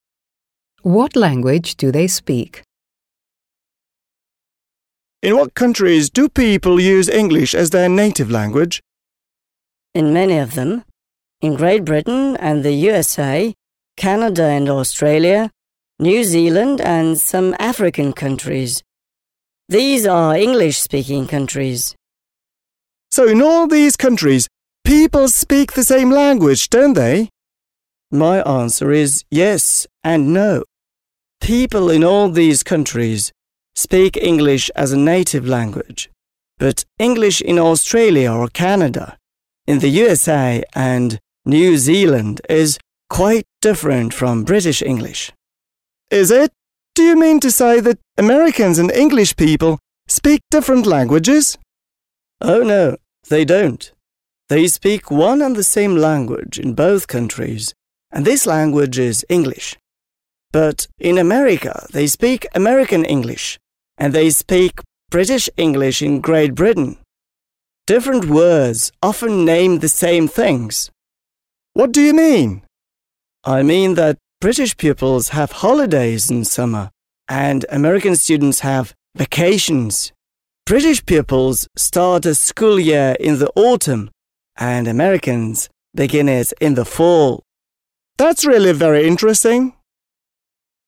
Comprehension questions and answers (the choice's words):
Listen to the dialogue and complete these sentences.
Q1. People use English as their native language in ... .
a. Great Britain, the USA and Germany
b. English-speaking countries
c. South America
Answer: English-speaking countries

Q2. In all English-speaking countries people ... .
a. use one and the same native language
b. speak English in the same way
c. speak British English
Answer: use one and the same native language

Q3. Sometimes different words name the same things in ... .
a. Great Britain and America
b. Australia and New Zealand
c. Canada and Australia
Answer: Great Britain and America

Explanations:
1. В этом предложении речь идет о странах, где английский язык является основным. Наиболее подходящий вариант — «English-speaking countries», так как это выражение охватывает такие страны, как Великобритания, США, Австралия, Канада и другие, где английский является первым языком. Структура предложения использует настоящее простое время (present simple), которое в данном контексте выражает общее утверждение о языке в этих странах.
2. Это предложение подчеркивает, что в этих странах родной язык одинаков — английский. Структура также в настоящем простом времени, так как речь идет о регулярном или универсальном факте, который происходит во всех англоязычных странах. Фраза «one and the same native language» подчеркивает, что несмотря на разные акценты и диалекты, основной язык остается одинаковым.

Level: 7 класс